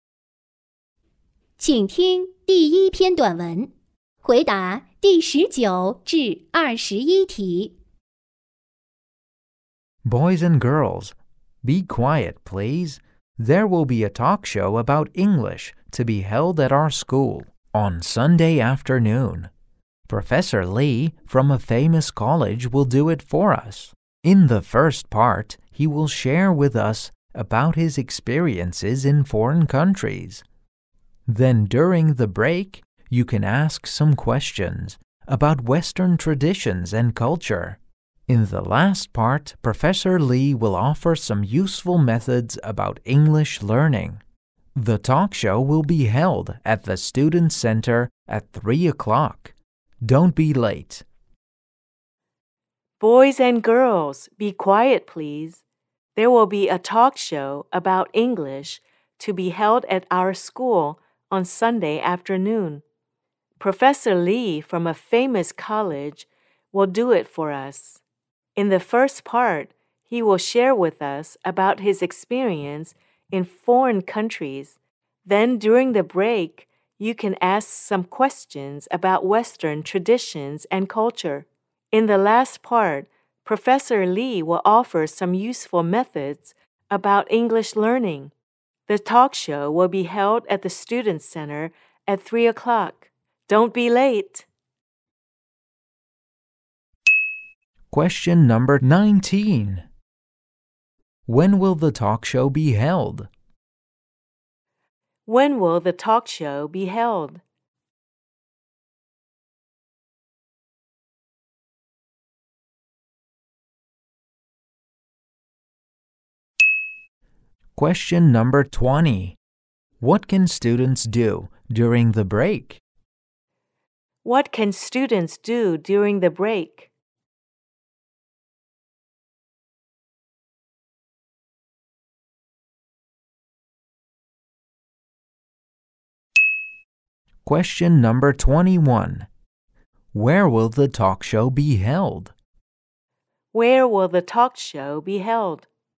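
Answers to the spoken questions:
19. At 3 o'clock on Sunday afternoon.
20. Ask questions about Western traditions and culture.
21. At the Student Center.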